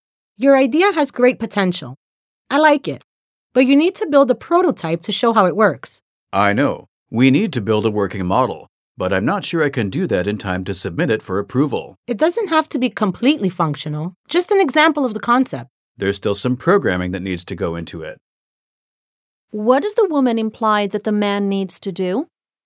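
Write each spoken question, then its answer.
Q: What does the woman imply that the man needs to do?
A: Build a prototype (a model showing the concept); it doesn't have to be fully working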